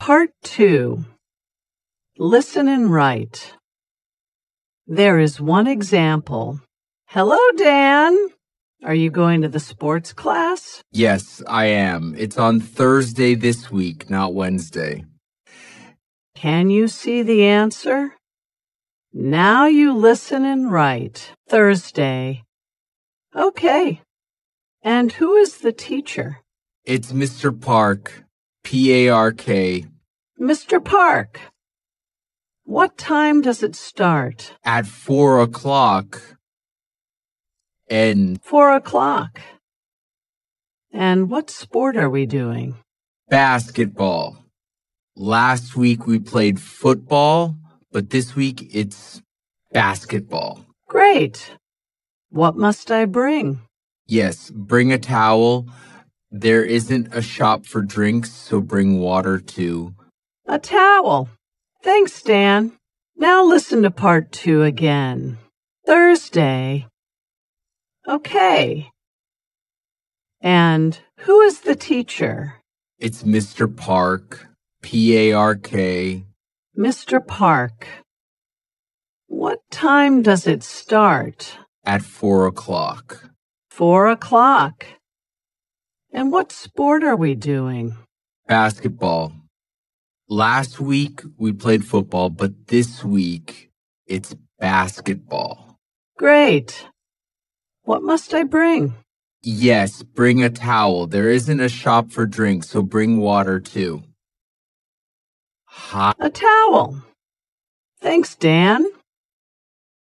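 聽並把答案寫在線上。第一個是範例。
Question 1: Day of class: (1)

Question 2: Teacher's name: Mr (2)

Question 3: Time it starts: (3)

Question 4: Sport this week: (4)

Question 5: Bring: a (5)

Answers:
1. Thursday
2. Park
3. four o'clock
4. basketball
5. towel

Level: Movers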